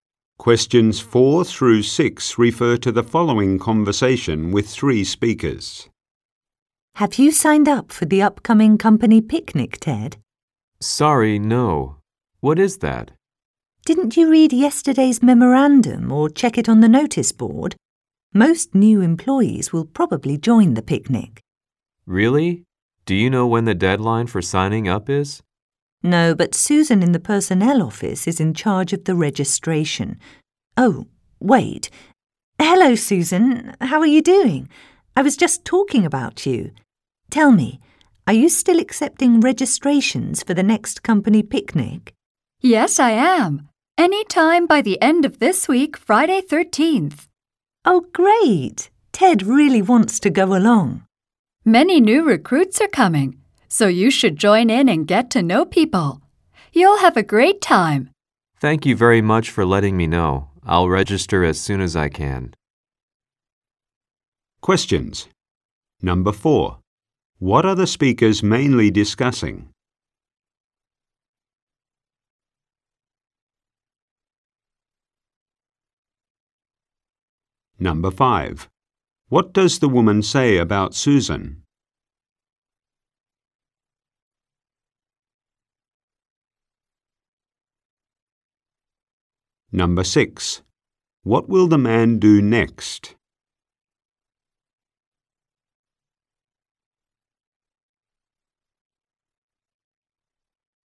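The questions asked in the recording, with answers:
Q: What are the speakers mainly discussing?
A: Signing up for the company picnic

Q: What does the woman say about Susan?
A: She is in charge of registration for the picnic

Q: What will the man do next?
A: Register for the picnic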